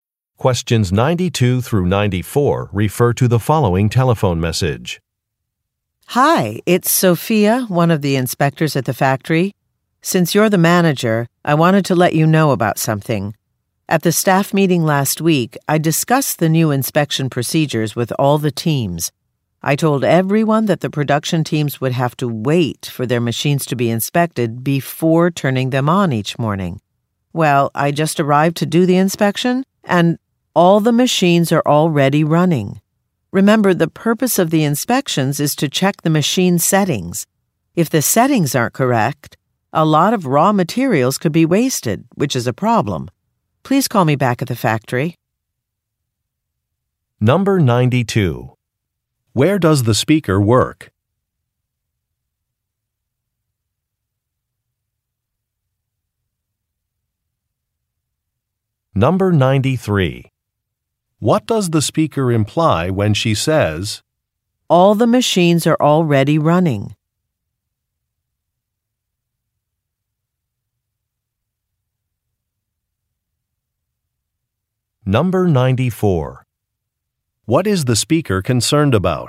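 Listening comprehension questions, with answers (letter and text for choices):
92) Where does the speaker work?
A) At a farm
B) At a factory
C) At a television station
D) At a repair shop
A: B) At a factory

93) What does the speaker imply when she says, "all the machines are already running"?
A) Some instructions were not followed.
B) It is too late to change an assignment.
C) A project deadline will be met.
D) Extra help will not be needed.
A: A) Some instructions were not followed.

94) What is the speaker concerned about?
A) Misplacing a manual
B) Exceeding a budget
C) Breaking a contract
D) Wasting materials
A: D) Wasting materials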